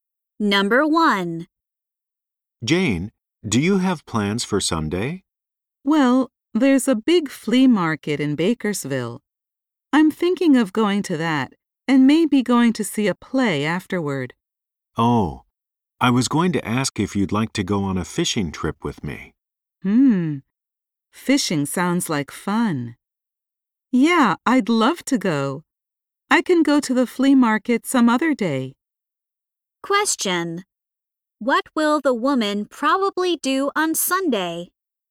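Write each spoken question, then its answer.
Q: What will the woman probably do on Sunday?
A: Go on a fishing trip with the man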